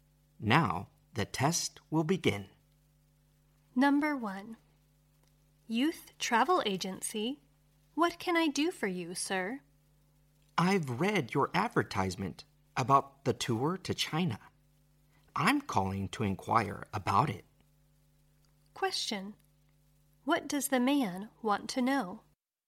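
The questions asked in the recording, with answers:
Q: What does the man want to know?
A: About the tour to China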